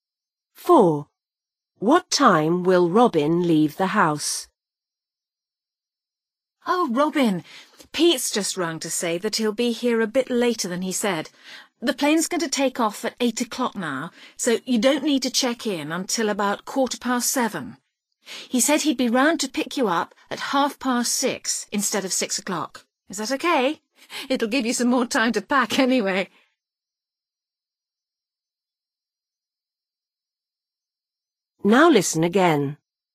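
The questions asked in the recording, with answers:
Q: What time will Robin leave the house?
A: 6:30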